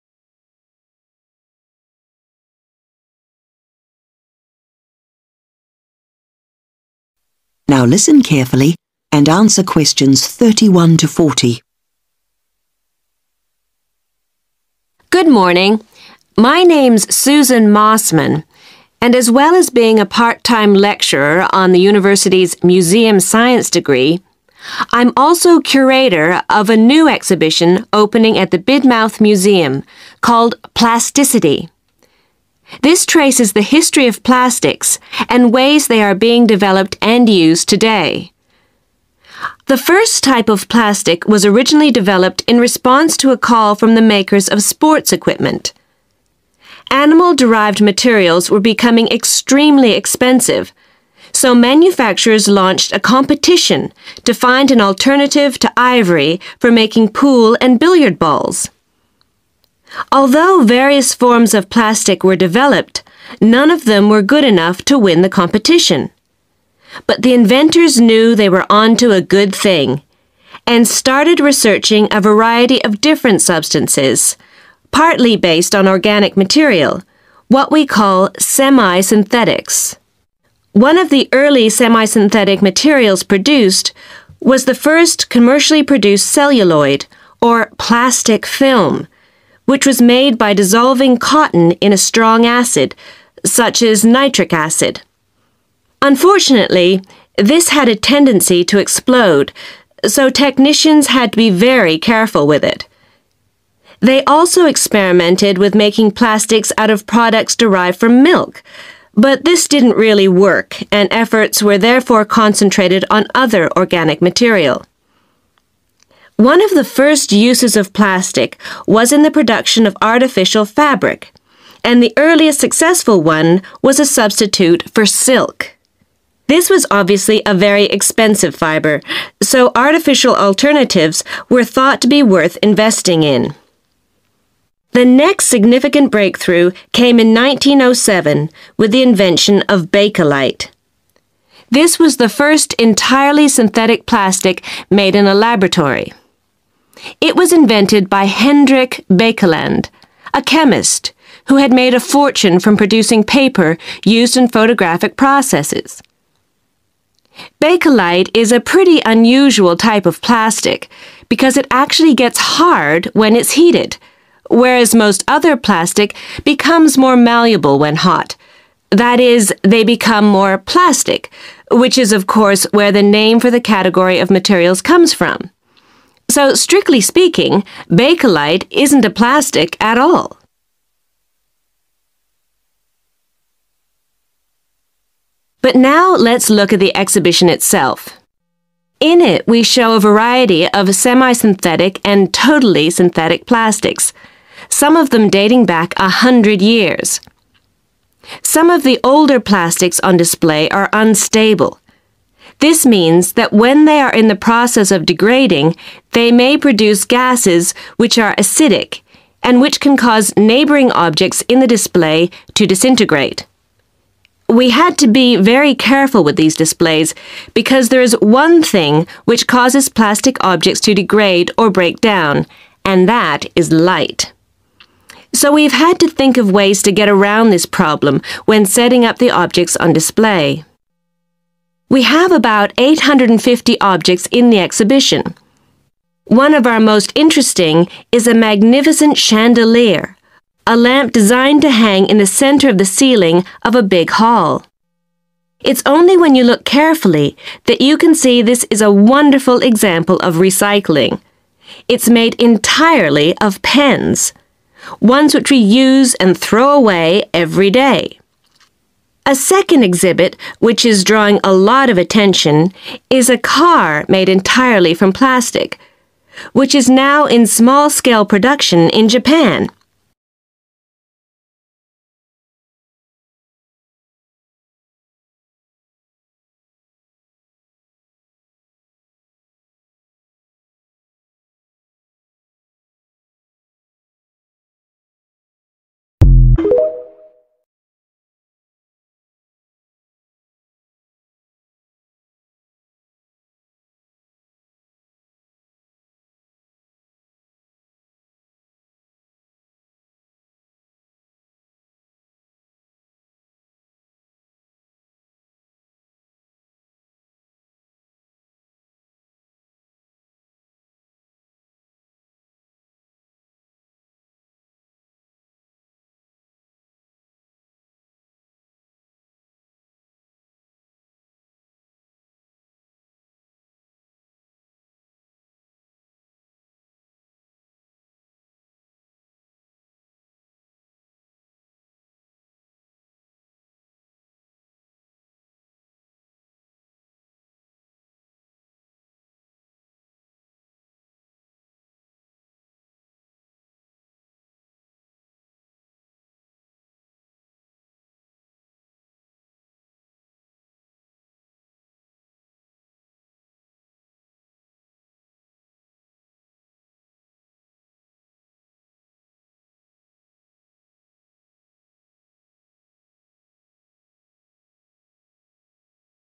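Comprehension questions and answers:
SECTION 4 Questions 31-40 Complete the notes below. Write ONE WORD ONLY for each answer.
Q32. experiments making plastics from 32_______products were unsuccessful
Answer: milk

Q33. earliest fabric to be produced was artificial 33_______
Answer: silk

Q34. first plastic produced in a 34_______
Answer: laboratory

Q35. invented by a 35_______called Hendrik Baekeland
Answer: chemist

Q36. unusual because it becomes 36_______when heated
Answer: hard

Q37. older plastic objects may release acidic 37_______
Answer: gases

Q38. plastic objects degrade in 38_______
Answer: light

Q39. chandelier made using recycled 39_______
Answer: pens

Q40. a_______made in Japan from semi-synthetic materials basedon substances found in plantations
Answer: car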